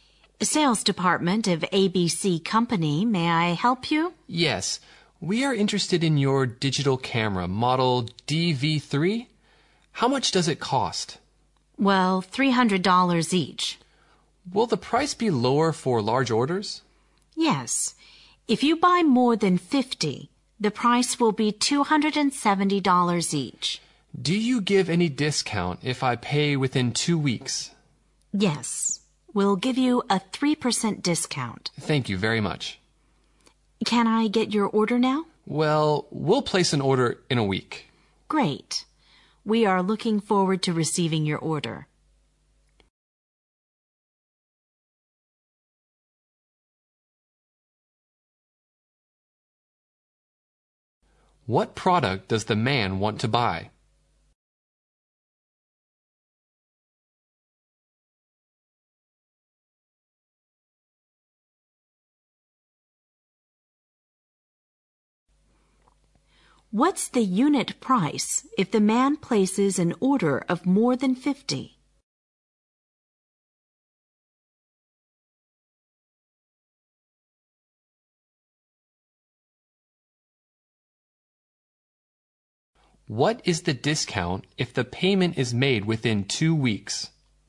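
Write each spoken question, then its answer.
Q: What product does the man want to buy?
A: A digital camera, model DV3

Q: What's the unit price if the man places an order of more than 50?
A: $270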